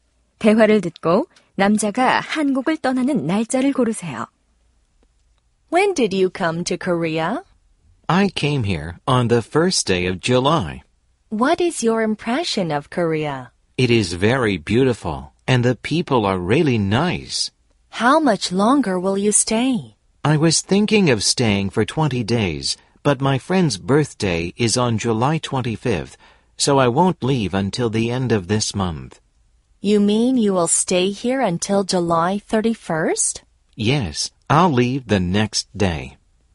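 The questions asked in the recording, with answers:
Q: 대화를 듣고 남자가 한국을 떠나는 날짜를 고르세요.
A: 8월 1일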